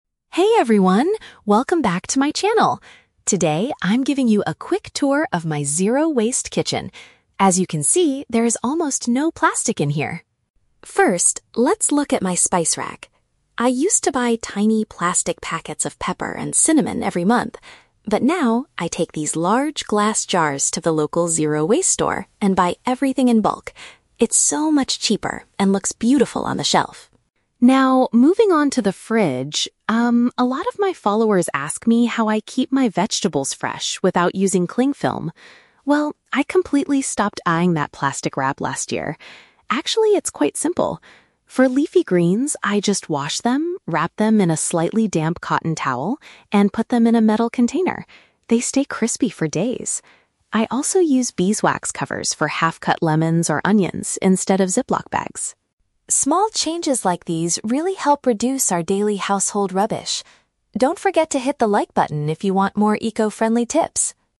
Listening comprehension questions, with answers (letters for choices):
Listen to a lifestyle vlogger talking about her kitchen, then choose the correct answer (A, B, or C) for each question.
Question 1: How does the vlogger currently get her spices?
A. She orders small plastic packets of them online.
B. She purchases them in large quantities using her own containers.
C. She grows them herself in her beautiful zero-waste garden.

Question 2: What method does she use to keep her leafy vegetables fresh?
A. She wraps them in standard plastic film.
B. She puts them inside completely dry ziplock bags.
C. She uses a wet cloth and a metal box.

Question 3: What is the main reason the vlogger makes these small changes?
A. To decrease the amount of everyday waste created at home.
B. To show her followers how to cook healthy meals.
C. To sell her own brand of glass jars and beeswax covers.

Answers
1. B
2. C
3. A

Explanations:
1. The vlogger says she takes her "large glass jars" to the store and buys everything "in bulk." Option (B) uses paraphrasing ("large quantities" for "in bulk", "own containers" for "glass jars"). Option (A) is a trap; she mentions "tiny plastic packets," but that is what she used to buy in the past. Option (C) is a plausible eco-friendly action but is never mentioned in the audio.
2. She explains that she wraps the greens in a "slightly damp cotton towel" and puts them in a "metal container." Option (C) uses synonyms ("wet cloth" for "damp cotton towel", "box" for "container"). Option (A) is a trap; she explicitly states she "completely stopped buying that plastic wrap" (cling film). Option (B) is a trap; she mentions "ziplock bags," but she uses beeswax covers instead of them.
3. Near the end, she says, "Small changes like these really help reduce our daily household rubbish." Option (A) uses paraphrasing ("decrease" for "reduce", "everyday waste" for "daily rubbish"). Options (B) and (C) are traps; she is a lifestyle vlogger so cooking or selling products might be common in real life, but neither is mentioned as her goal in this specific video.

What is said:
Vlogger: Hey everyone, welcome back to my channel! Today, I'm giving you a quick tour of my zero-waste kitchen. As you can see, there is almost no plastic in here.
First, let's look at my spice rack. I used to buy tiny plastic packets of pepper and cinnamon every month. But now, I take these large glass jars to the local zero-waste store and buy everything in bulk. It's so much cheaper and looks beautiful on the shelf.
Now, moving on to the fridge... um, a lot of my followers ask me how I keep my vegetables fresh without using cling film. Well, I completely stopped buying that plastic wrap last year. Actually, it's quite simple. For leafy greens, I just wash them, wrap them in a slightly damp cotton towel, and put them in a metal container. They stay crispy for days! I also use beeswax covers for half-cut lemons or onions instead of ziplock bags.
Small changes like these really help reduce our daily household rubbish. Don't forget to hit the like button if you want more eco-friendly tips!